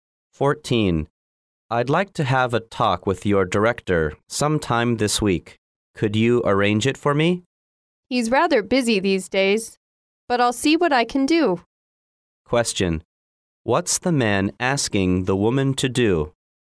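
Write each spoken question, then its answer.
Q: What's the man asking the woman to do?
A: Arrange a talk with her director this week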